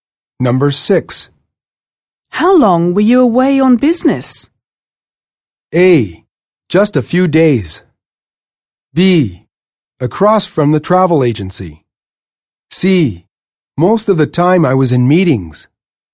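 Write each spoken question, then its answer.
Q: How long were you away on business?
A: A: Just a few days.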